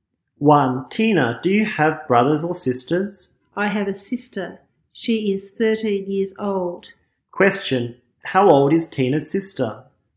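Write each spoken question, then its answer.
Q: How old is Tina's sister?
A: 13 years old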